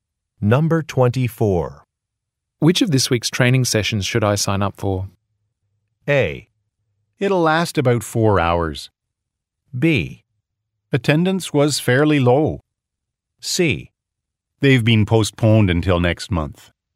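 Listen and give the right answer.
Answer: C: They've been postponed until next month.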